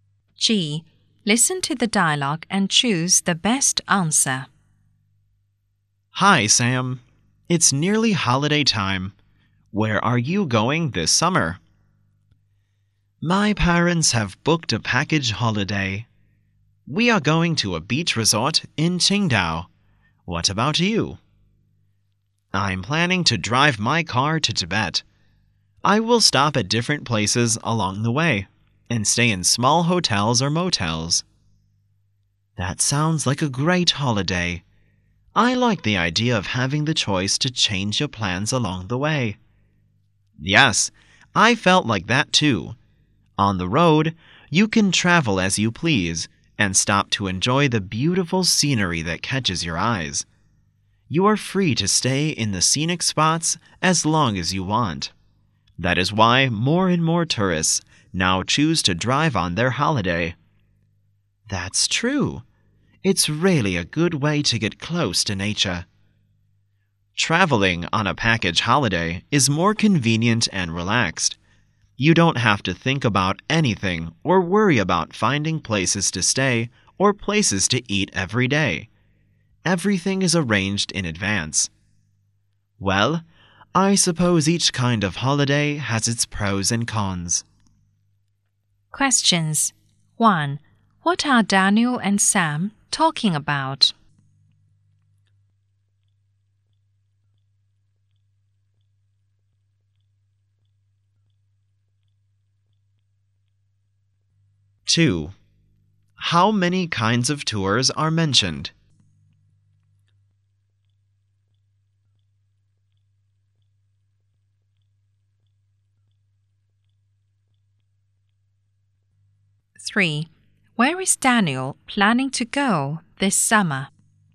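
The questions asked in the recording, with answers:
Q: What are Daniel and Sam talking about?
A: Their summer holiday plans

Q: How many kinds of tours are mentioned?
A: Two

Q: Where is Daniel planning to go this summer?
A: Tibet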